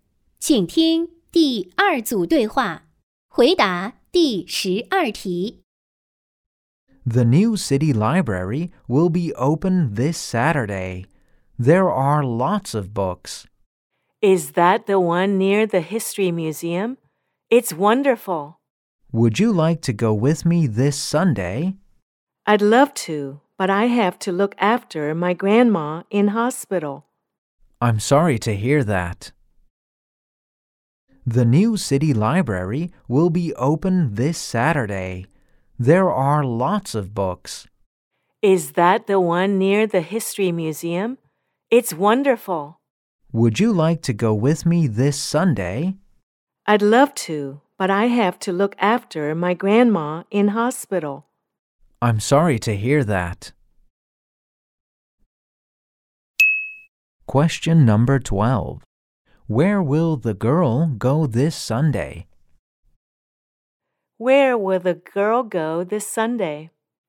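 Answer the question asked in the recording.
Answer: To the hospital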